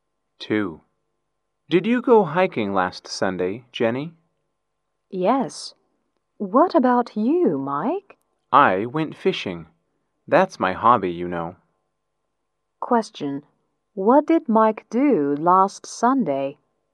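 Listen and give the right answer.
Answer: He went fishing.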